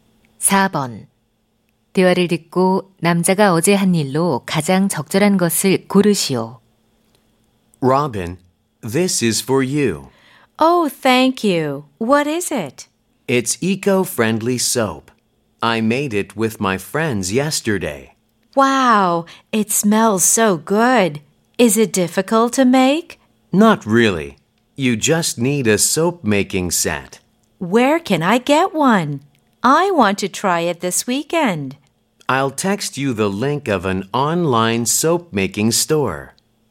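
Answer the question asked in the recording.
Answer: 친구들과 친환경 비누 만들기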